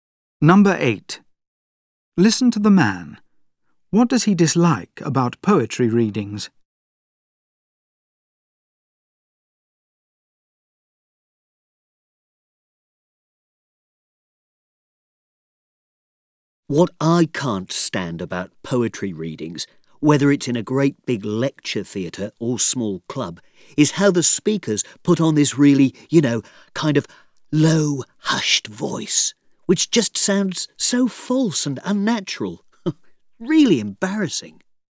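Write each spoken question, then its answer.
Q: What does he dislike about poetry readings?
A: The readers' false, unnatural hushed voices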